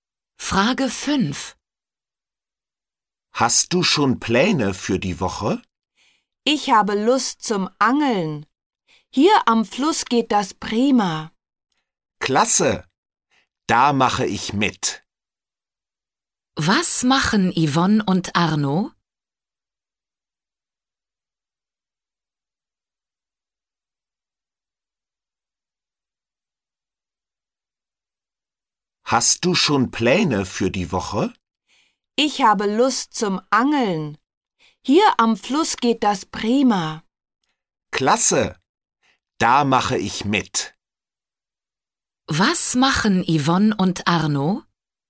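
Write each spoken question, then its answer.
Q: Was machen Yvonne und Arno?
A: Sie gehen angeln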